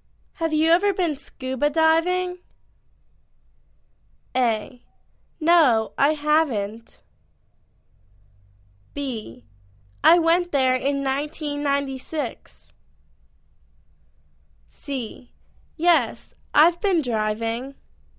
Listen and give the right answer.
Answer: No, I haven't.